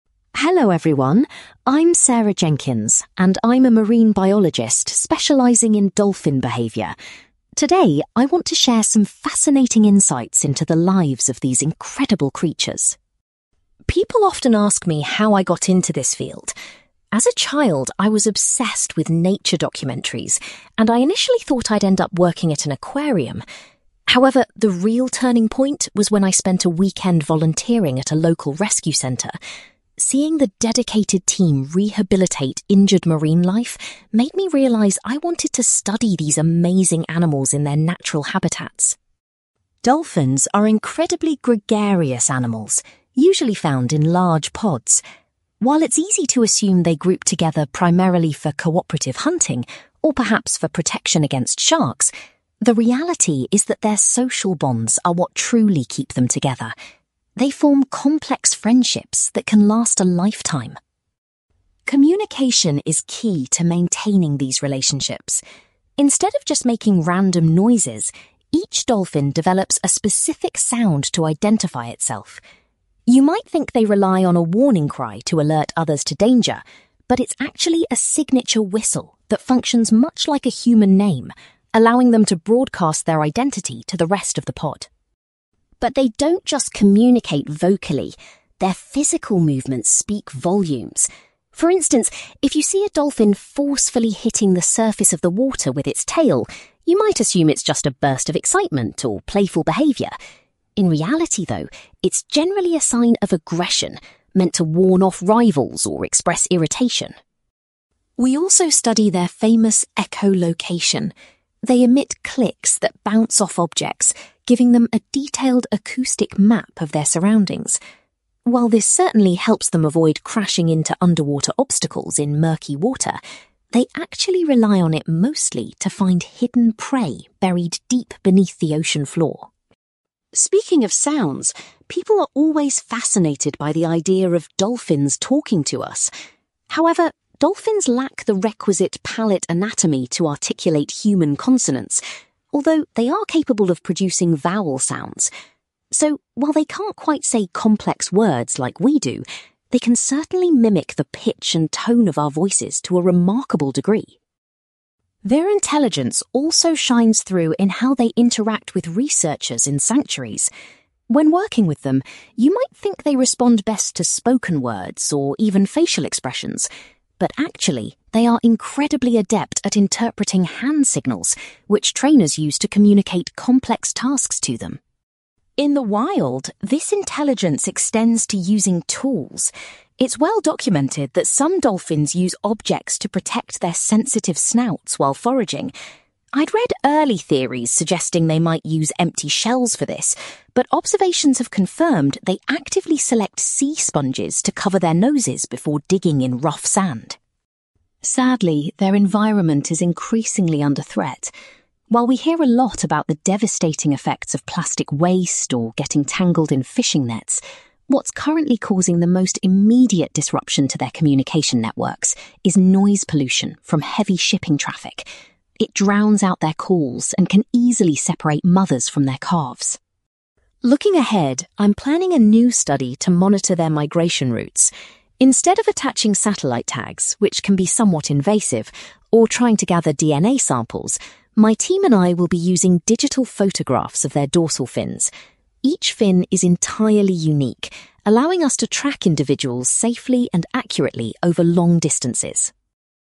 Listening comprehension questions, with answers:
You will hear a marine biologist called Sarah Jenkins giving a presentation about her research on dolphin behaviour. For questions 9-18, complete the sentences with a word or short phrase.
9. Sarah's interest in marine mammals was sparked by a visit to a (9)........................... .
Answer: rescue centre

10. Sarah explains that the main reason dolphins live in large groups is to maintain their (10)........................... .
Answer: social bonds

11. Dolphins use a unique (11)........................... to introduce themselves to others.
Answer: signature whistle

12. Sarah was surprised to learn that a dolphin slapping its tail is often a display of (12)........................... .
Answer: aggression

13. Dolphins use echolocation primarily to locate (13)........................... under the sand.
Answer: hidden prey

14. Because of their mouth anatomy, dolphins can only imitate the (14)........................... of human speech.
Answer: vowel sounds

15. Sarah mentions that researchers use (15)........................... to give instructions to dolphins.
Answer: hand signals

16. Dolphins protect themselves with (16)........................... while searching for food on the ocean floor.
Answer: sea sponges

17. Sarah identifies (17)........................... as a major threat to dolphin communication today.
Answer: noise pollution

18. In her next project, Sarah will rely on (18)........................... to track dolphin movements.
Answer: digital photographs

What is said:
Sarah: Hello everyone. I'm Sarah Jenkins, and I'm a marine biologist specialising in dolphin behaviour. Today I want to share some fascinating insights into the lives of these incredible creatures.
People often ask me how I got into this field. As a child, I was obsessed with nature documentaries, and I initially thought I'd end up working at an aquarium. However, the real turning point was when I spent a weekend volunteering at a local rescue centre. Seeing the dedicated team rehabilitate injured marine life made me realise I wanted to study these amazing animals in their natural habitats.
Dolphins are incredibly gregarious animals, usually found in large pods. While it's easy to assume they group together primarily for cooperative hunting, or perhaps for protection against sharks, the reality is that their social bonds are what truly keep them together. They form complex friendships that can last a lifetime.
Communication is key to maintaining these relationships. Instead of just making random noises, each dolphin develops a specific sound to identify itself. You might think they rely on a warning cry to alert others to danger, but it's actually a signature whistle that functions much like a human name, allowing them to broadcast their identity to the rest of the pod.
But they don't just communicate vocally; their physical movements speak volumes. For instance, if you see a dolphin forcefully hitting the surface of the water with its tail, you might assume it's just a burst of excitement or playful behaviour. In reality, though, it's generally a sign of aggression, meant to warn off rivals or express irritation.
We also study their famous echolocation. They emit clicks that bounce off objects, giving them a detailed acoustic map of their surroundings. While this certainly helps them avoid crashing into underwater obstacles in murky water, they actually rely on it mostly to find hidden prey buried deep beneath the ocean floor.
Speaking of sounds, people are always fascinated by the idea of dolphins talking to us. However, dolphins lack the requisite palate anatomy to articulate human consonants, although they are capable of producing vowel sounds. So, while they can't quite say complex words like we do, they can certainly mimic the pitch and tone of our voices to a remarkable degree.
Their intelligence also shines through in how they interact with researchers in sanctuaries. When working with them, you might think they respond best to spoken words or even facial expressions. But actually, they are incredibly adept at interpreting hand signals, which trainers use to communicate complex tasks to them.
In the wild, this intelligence extends to using tools. It's well documented that some dolphins use objects to protect their sensitive snouts while foraging. I'd read early theories suggesting they might use empty shells for this, but observations have confirmed they actively select sea sponges to cover their noses before digging in rough sand.
Sadly, their environment is increasingly under threat. While we hear a lot about the devastating effects of plastic waste or getting tangled in fishing nets, what's currently causing the most immediate disruption to their communication networks is noise pollution from heavy shipping traffic. It drowns out their calls and can easily separate mothers from their calves.
Looking ahead, I'm planning a new study to monitor their migration routes. Instead of attaching satellite tags, which can be somewhat invasive, or trying to gather DNA samples, my team and I will be using digital photographs of their dorsal fins. Each fin is entirely unique, allowing us to track individuals safely and accurately over long distances.

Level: B2